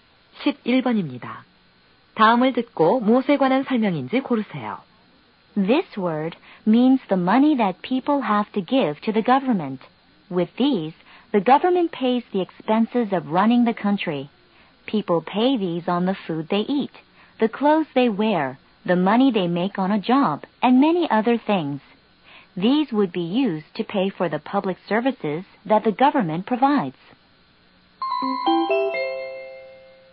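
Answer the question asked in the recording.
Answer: 세금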